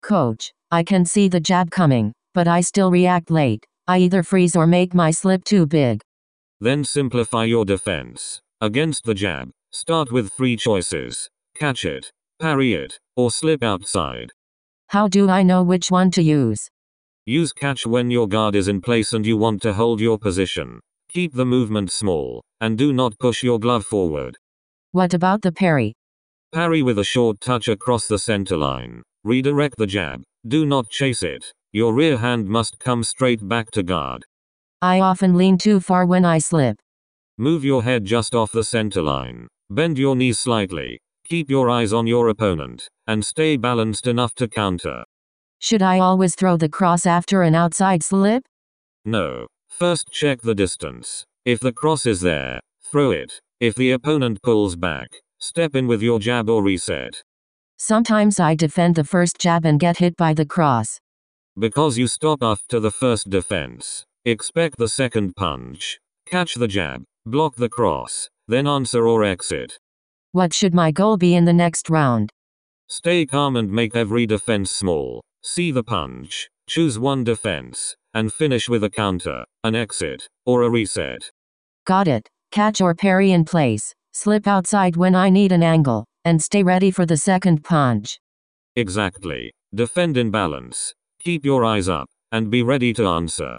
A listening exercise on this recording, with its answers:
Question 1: Against the jab, catch it, ______ it, or slip outside.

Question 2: Keep the movement ______.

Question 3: Redirect the jab; do not ______ it.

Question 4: Move your head just off the ______.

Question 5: Expect the second ______.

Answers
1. parry
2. small
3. chase
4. centerline
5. punch